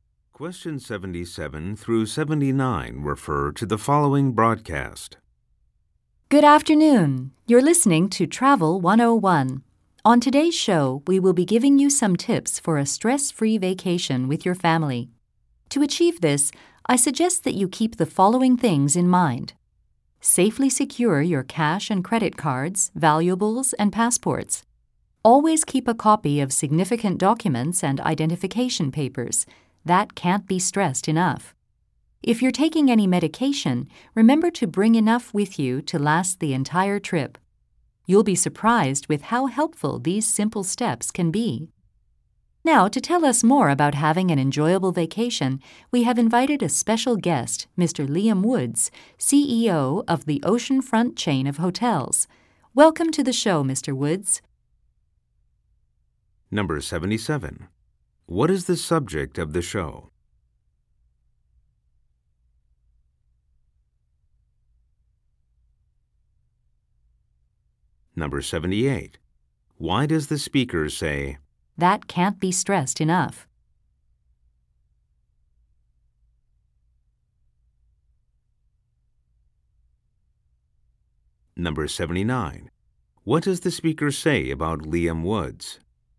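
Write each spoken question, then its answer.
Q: What is the subject of the show?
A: Tips for a stress-free family vacation

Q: What does the speaker say about Liam Woods?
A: He is CEO of the Oceanfront Chain of Hotels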